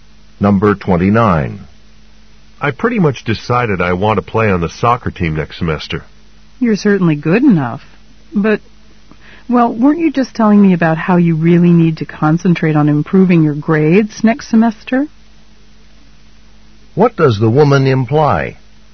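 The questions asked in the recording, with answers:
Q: What does the woman imply?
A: Playing soccer may get in the way of improving his grades.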